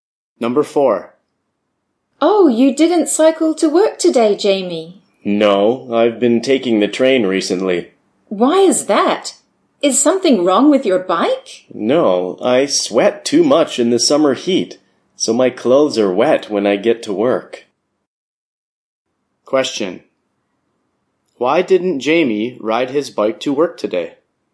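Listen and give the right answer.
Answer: He sweats too much in the summer heat and his clothes get wet.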